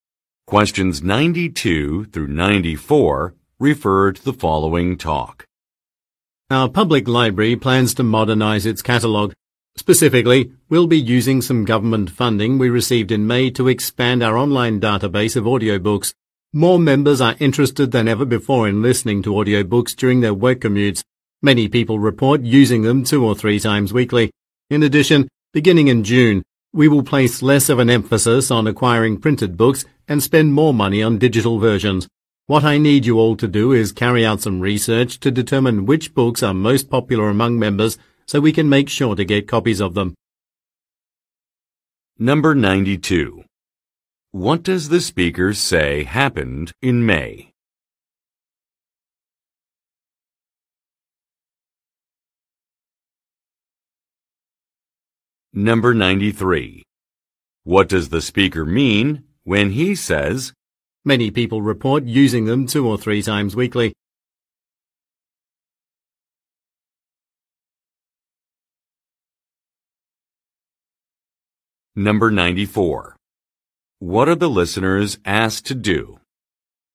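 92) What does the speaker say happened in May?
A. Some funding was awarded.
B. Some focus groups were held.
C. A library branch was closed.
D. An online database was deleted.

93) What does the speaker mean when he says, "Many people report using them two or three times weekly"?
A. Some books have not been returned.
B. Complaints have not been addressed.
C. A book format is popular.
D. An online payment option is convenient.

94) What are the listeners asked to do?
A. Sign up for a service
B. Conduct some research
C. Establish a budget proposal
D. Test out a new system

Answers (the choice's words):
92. Some funding was awarded.
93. A book format is popular.
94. Conduct some research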